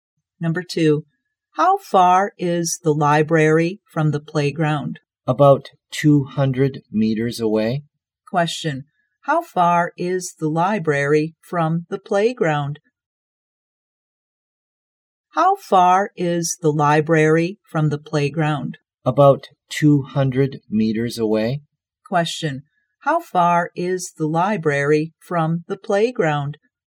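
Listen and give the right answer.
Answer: About 200 meters.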